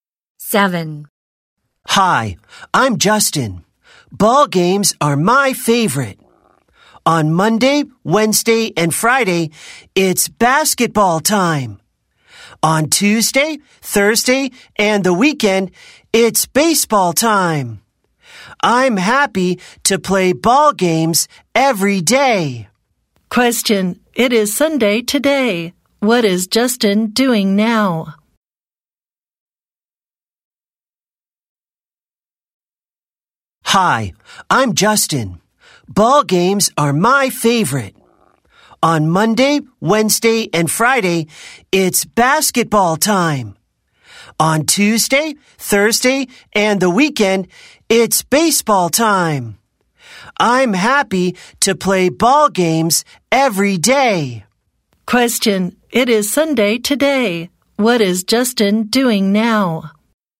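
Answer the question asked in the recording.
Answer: Playing baseball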